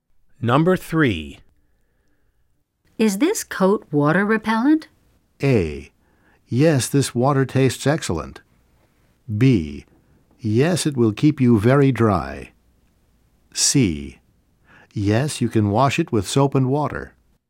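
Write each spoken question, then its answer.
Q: Is this coat water repellent?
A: B: Yes, it will keep you very dry.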